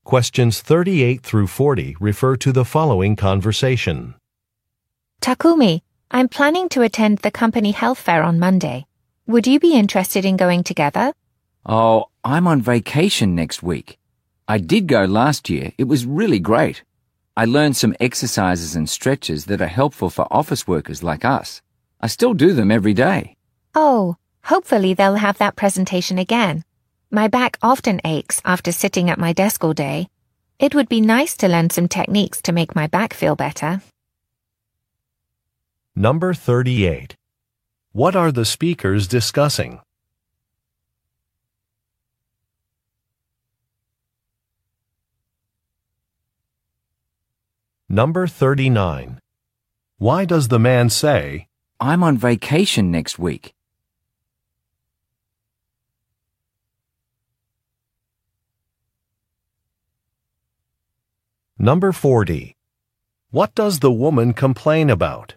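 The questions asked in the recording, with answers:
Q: What are the speakers discussing?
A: A company health fair

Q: Why does the man say, I'm on vacation next week?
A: To say he can't go to the health fair with her

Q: What does the woman complain about?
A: Her back often aches after sitting at her desk all day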